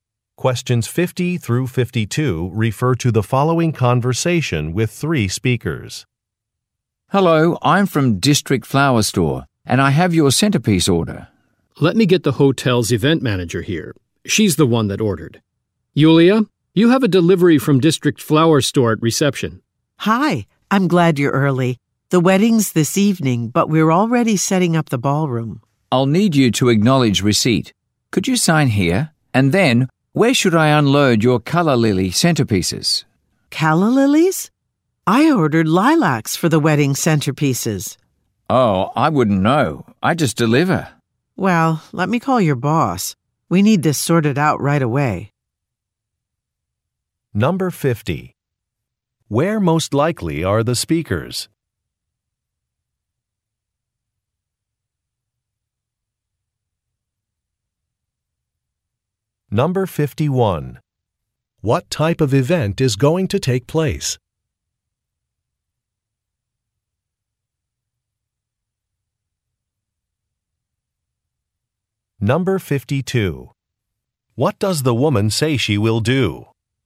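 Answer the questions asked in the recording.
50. At a hotel
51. A wedding
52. Call the man's boss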